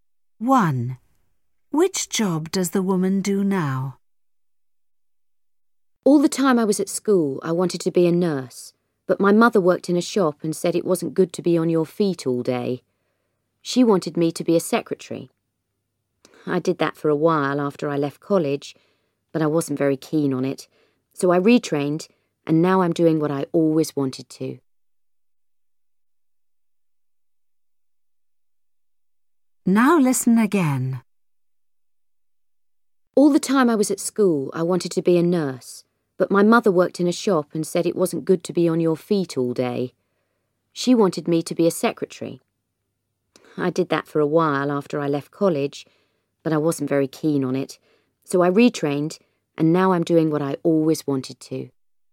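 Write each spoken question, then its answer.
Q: Which job does the woman do now?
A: a nurse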